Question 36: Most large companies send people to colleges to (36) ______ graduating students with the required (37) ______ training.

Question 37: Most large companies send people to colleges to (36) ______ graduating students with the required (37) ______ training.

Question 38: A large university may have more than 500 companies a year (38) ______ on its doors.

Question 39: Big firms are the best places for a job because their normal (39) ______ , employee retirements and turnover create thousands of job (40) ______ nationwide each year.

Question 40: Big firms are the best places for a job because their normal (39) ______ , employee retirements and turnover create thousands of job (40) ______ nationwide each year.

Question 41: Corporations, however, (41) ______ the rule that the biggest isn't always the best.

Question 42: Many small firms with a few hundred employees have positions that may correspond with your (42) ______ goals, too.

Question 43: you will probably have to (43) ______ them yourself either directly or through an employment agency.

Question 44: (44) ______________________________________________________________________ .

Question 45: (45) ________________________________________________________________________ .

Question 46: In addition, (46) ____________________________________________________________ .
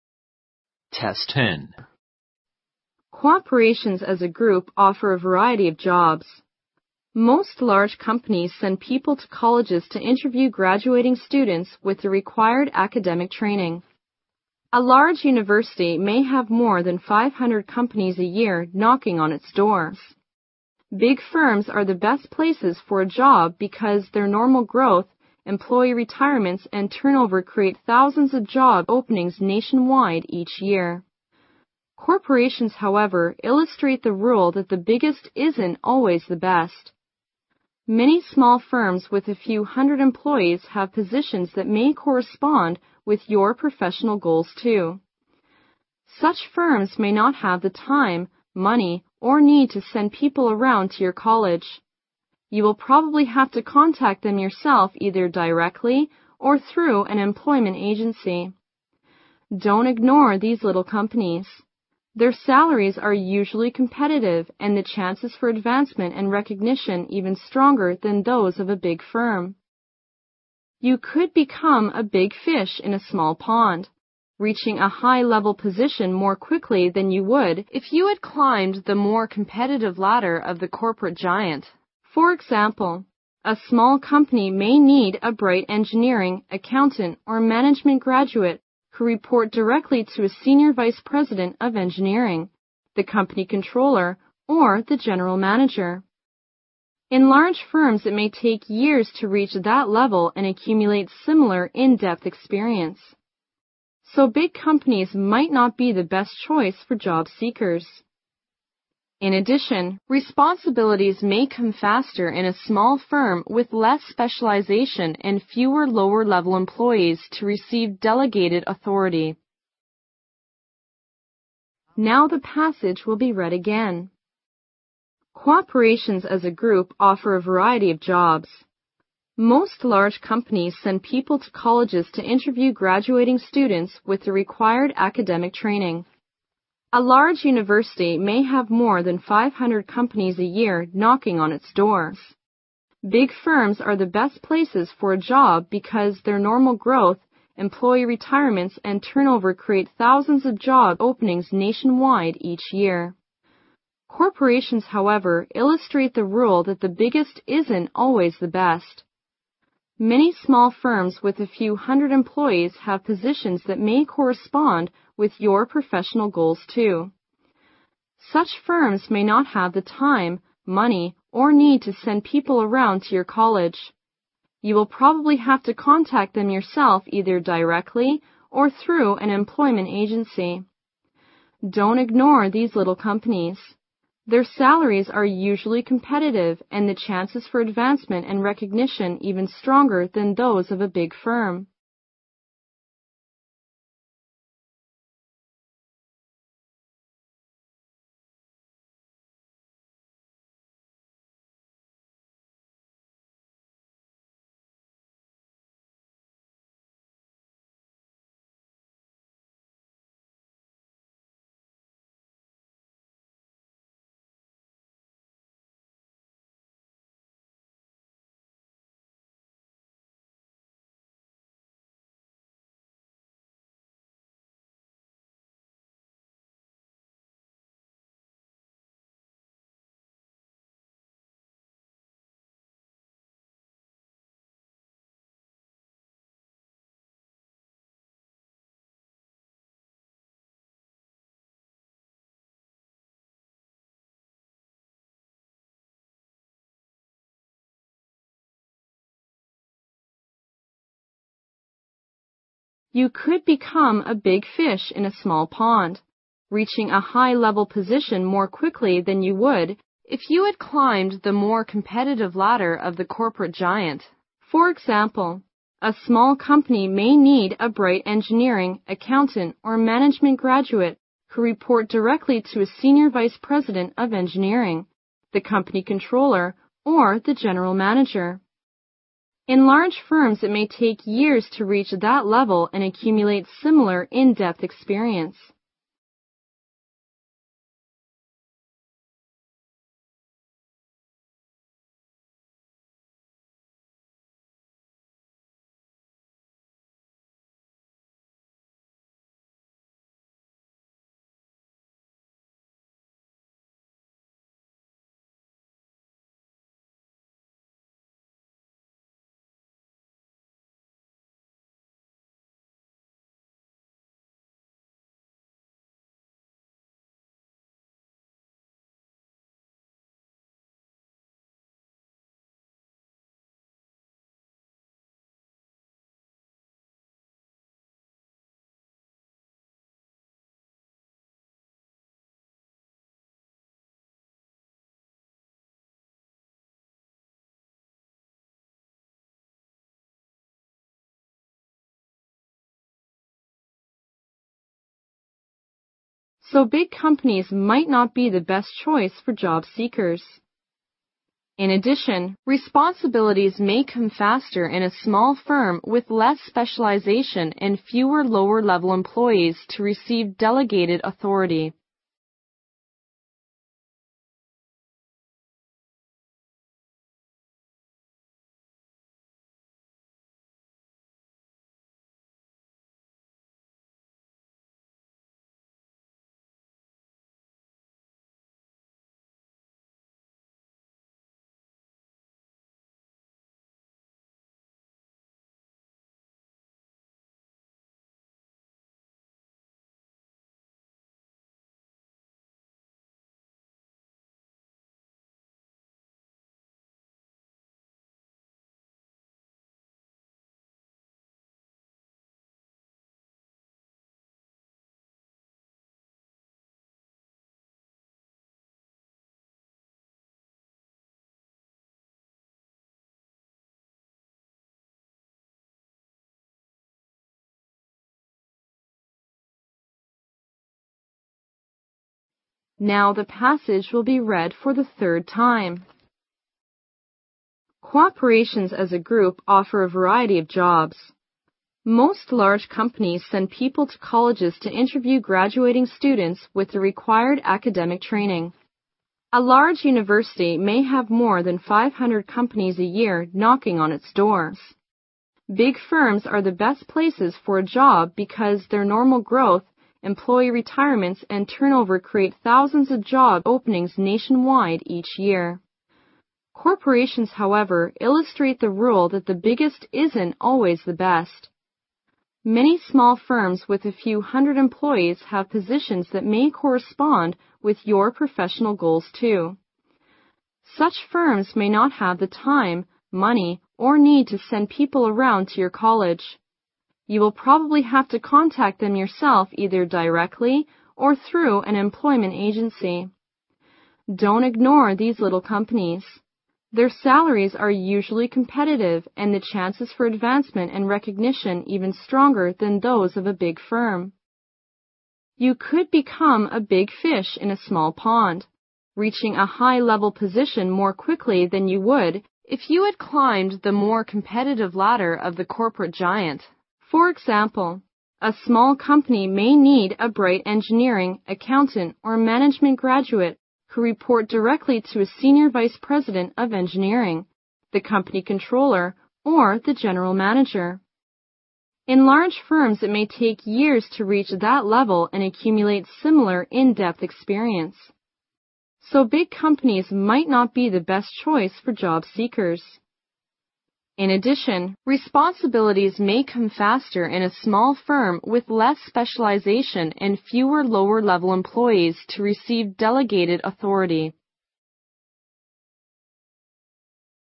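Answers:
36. interview
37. academic
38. knocking
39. growth
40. openings
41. illustrate
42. professional
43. contact
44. Their salaries are usually competitive and the chances for advancement and recognition even stronger than those of a big firm
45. In large firms, it may take years to reach that level and accumulate similar in-depth experience
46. responsibilities may come faster in a small firm with less specialization and fewer lower-level employees to receive delegated authority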